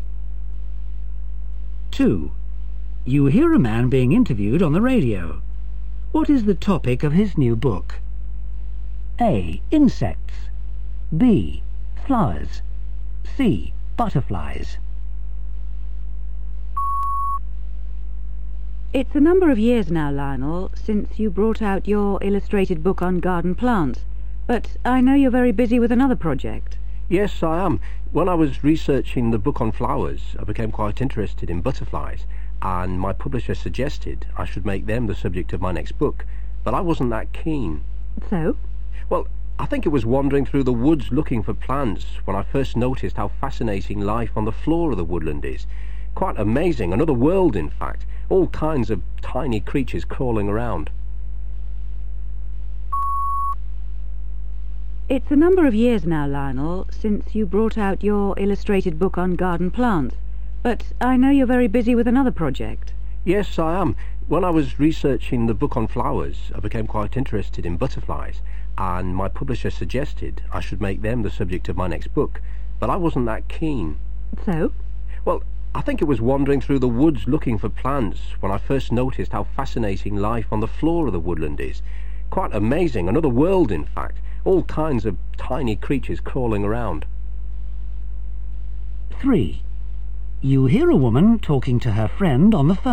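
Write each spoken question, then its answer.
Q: What is the topic of his new book?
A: A: Insects.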